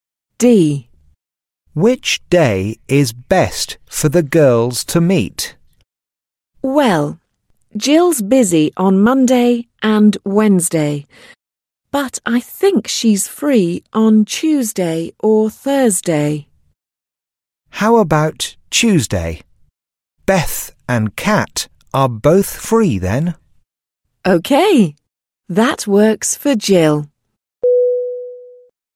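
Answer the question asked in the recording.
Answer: Tuesday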